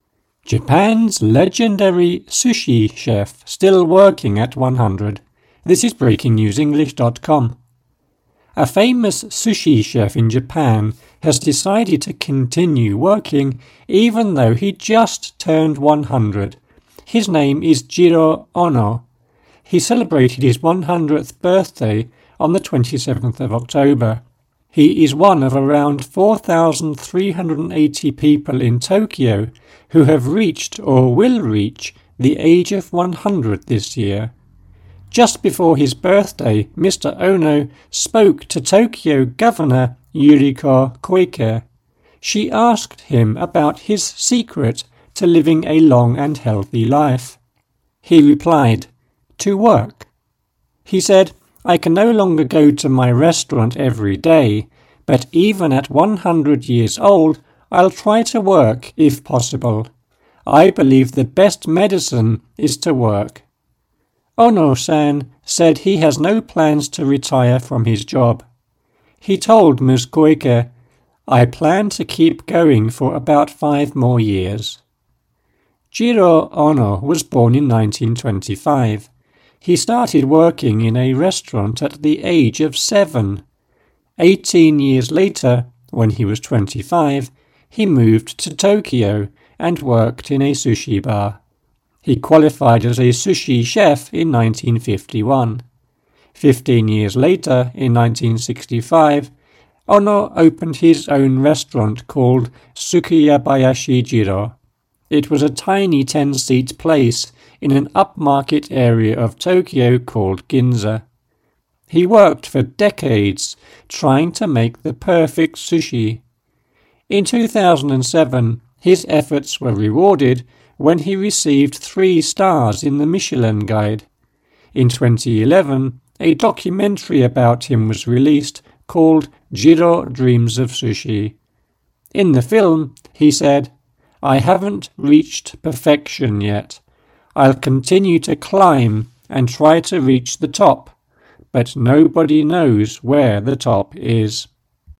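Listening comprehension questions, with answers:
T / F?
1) There are more than 4,000 in Tokyo over the age of 100.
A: T

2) Mr Ono said work is the secret to a long and healthy life.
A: T

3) Mr Ono said he takes medicine every day at work to stay healthy.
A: F

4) Mr Ono said he would continue working for another 10 years.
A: F

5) Mr Ono opened his first sushi bar when he was 25.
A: F

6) The sushi bar Mr Ono opened in 1965 had just 10 seats.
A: T

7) The Michelin Guide awarded Mr Ono three gold stars.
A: F

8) Mr Ono said he likes climbing mountains.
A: F

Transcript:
Japan's legendary sushi chef still working at 100
Master Sushi Chef Jiro Ono
A famous sushi chef in Japan has decided to continue working, even though he just turned 100. His name is Jiro Ono. He celebrated his 100th birthday on the 27th of October. He is one of around 4,380 people in Tokyo who have reached or will reach the age of 100 this year. 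Just before his birthday, Mr Ono spoke to Tokyo governor Yuriko Koike. She asked him about his secret to living a long and healthy life. He replied, "To work." He said: "I can no longer go to my restaurant every day...but even at 100 years old, I'll try to work if possible. I believe the best medicine is to work." Ono-san said he has no plans to retire from his job. He told Ms Koike: "I plan to keep going for about five more years."
Jiro Ono was born in 1925. He started working in a restaurant at the age of seven. Eighteen years later, when he was 25, he moved to Tokyo and worked in a sushi bar. He qualified as a sushi chef in 1951. Fifteen years later, in 1965, Ono opened his own restaurant, called Sukiyabashi Jiro. It was a tiny 10-seat place in an upmarket area of Tokyo called Ginza. He worked for decades trying to make the perfect sushi. In 2007, his efforts were rewarded when he received three stars in the Michelin Guide. 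In 2011, a documentary about him was released, called "Jiro Dreams of Sushi". In the film, he said: "I haven't reached perfection yet. I'll continue to climb and try to reach the top, but nobody knows where the top is."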